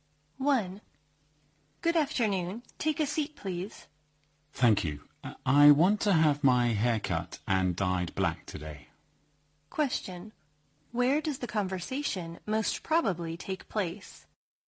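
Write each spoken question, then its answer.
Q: Where does the conversation most probably take place?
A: At a hair salon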